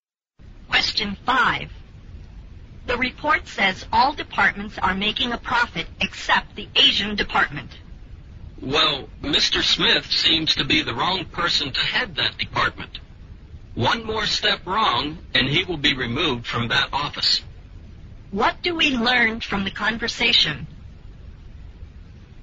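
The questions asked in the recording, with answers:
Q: What do we learn from the conversation?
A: The Asian department is losing money, and Mr. Smith may be removed as its head.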